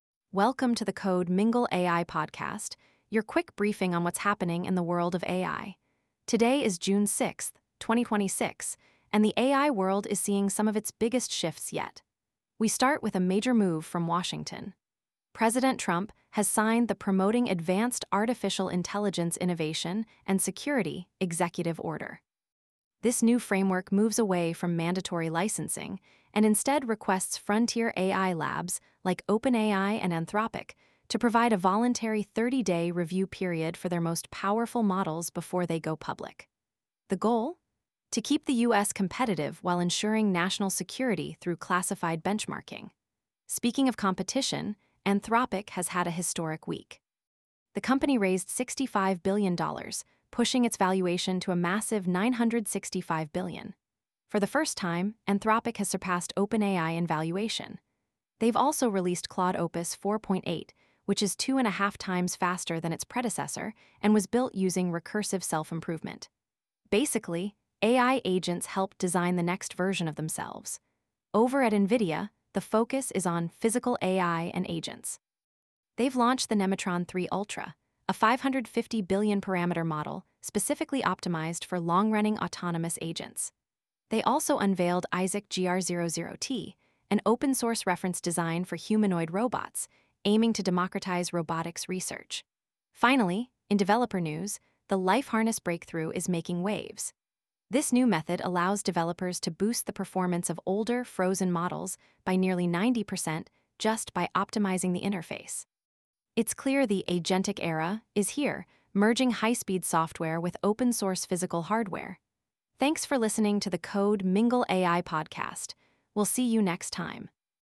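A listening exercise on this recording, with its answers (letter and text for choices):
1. What is the requested review period for frontier AI models under the June 2026 Executive Order?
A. 14 days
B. 30 days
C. 60 days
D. 90 days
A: B. 30 days

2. Which company reached a $965 billion valuation this week, surpassing OpenAI?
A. Google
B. Meta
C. Anthropic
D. NVIDIA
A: C. Anthropic

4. The 'Life-Harness' method improves the performance of which type of AI systems?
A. Vision Models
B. Frozen LLM Agents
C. Hardware Accelerators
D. Database Systems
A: B. Frozen LLM Agents

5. What is 'Isaac GR00T' in the context of NVIDIA's recent announcements?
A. A new GPU architecture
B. A cloud computing platform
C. An open humanoid robot reference design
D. A code generation tool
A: C. An open humanoid robot reference design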